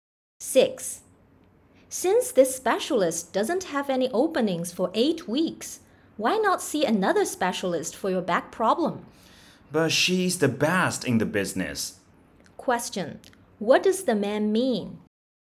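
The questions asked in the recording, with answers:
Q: What does the man mean?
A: He would rather wait for the best specialist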